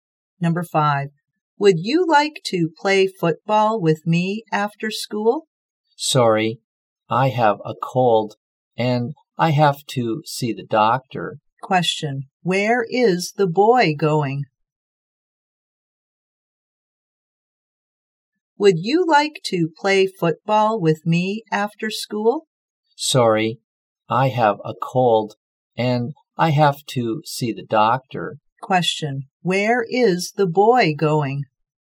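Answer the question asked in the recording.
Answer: To see the doctor.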